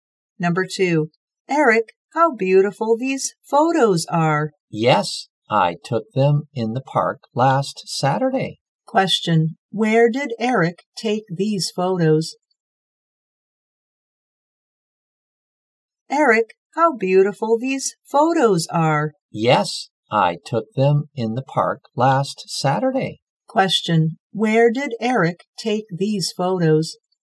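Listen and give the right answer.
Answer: In the park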